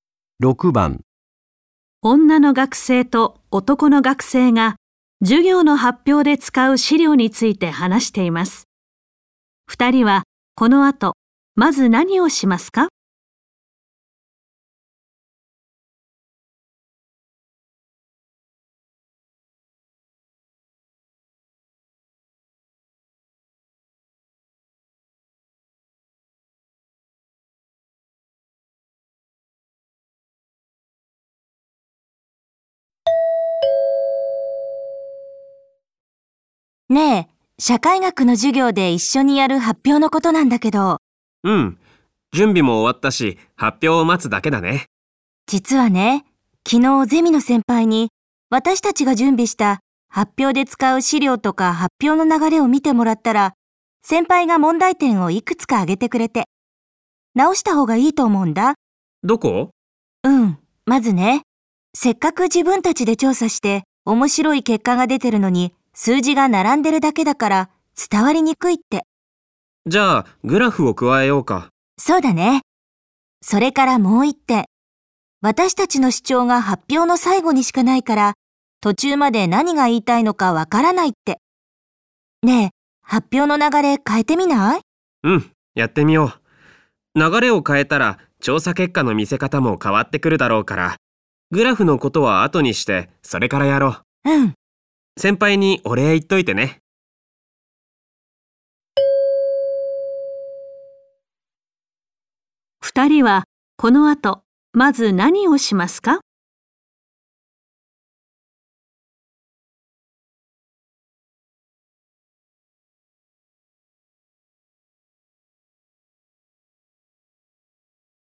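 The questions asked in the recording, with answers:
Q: 二人はこの後、まず何をしますか?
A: 発表の流れを変える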